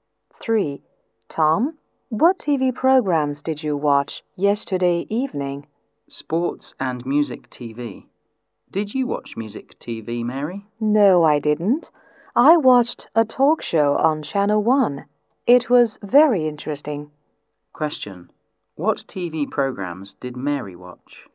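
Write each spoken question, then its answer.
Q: What TV programs did Mary watch?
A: A talk show on Channel 1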